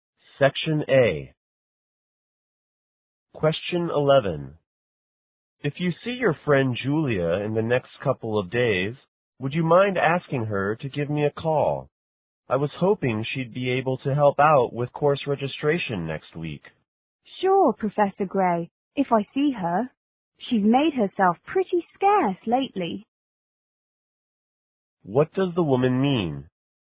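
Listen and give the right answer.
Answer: She hasn't seen Julia much lately, but she'll pass on the message if she sees her.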